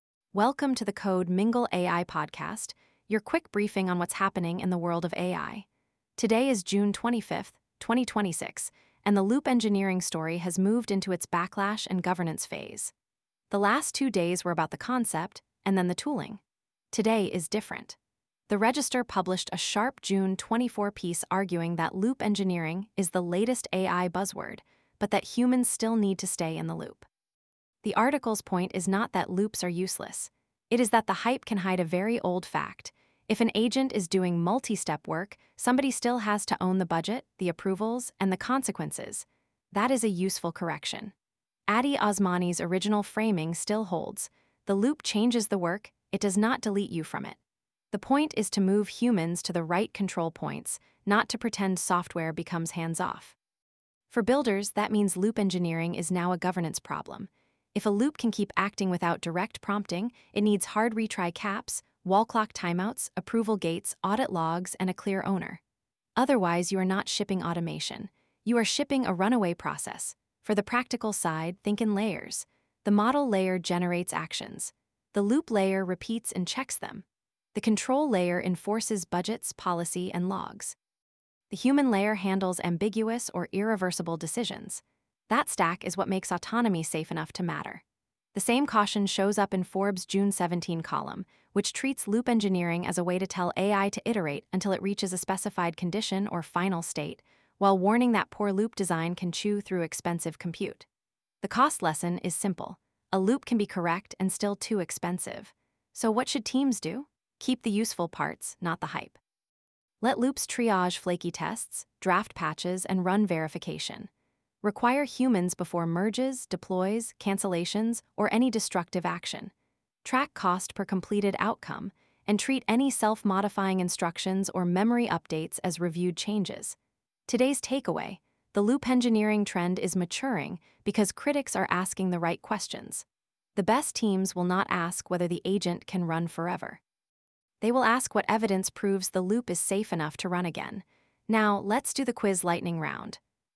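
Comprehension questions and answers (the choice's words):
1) What is the main deduped angle for the June 25 loop-engineering update?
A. The backlash and governance phase: humans, budgets, approvals, and control.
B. The first public definition of loop engineering.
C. A new set of repos for beginner onboarding.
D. A focus on prompt wording only.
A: The backlash and governance phase: humans, budgets, approvals, and control.

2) What does The Register argue about loop engineering?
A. It is useful, but it still needs humans in the loop and may be driven by token-spend incentives.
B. It proves humans are no longer necessary in AI workflows.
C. It has nothing to do with AI agents.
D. It only applies to image generation.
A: It is useful, but it still needs humans in the loop and may be driven by token-spend incentives.

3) Why are budget caps important in loop engineering?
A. Autonomous loops can consume tokens and runtime quickly, so spend needs explicit limits.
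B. They are only useful after a model is fully retired.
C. They replace the need for verification.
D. They make every loop completely free.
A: Autonomous loops can consume tokens and runtime quickly, so spend needs explicit limits.

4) What is the role of human review in a good loop?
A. Handle ambiguous, high-risk, or irreversible decisions before action is finalized.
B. Watch every keystroke forever.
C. Remove the need for logs.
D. Prevent the loop from ever running.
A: Handle ambiguous, high-risk, or irreversible decisions before action is finalized.

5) What is the best way to think about loop engineering in production?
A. As governed automation with clear owners, budgets, approvals, and audit trails.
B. As a replacement for all engineering judgment.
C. As a shortcut to delete testing.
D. As an excuse to ignore policy.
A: As governed automation with clear owners, budgets, approvals, and audit trails.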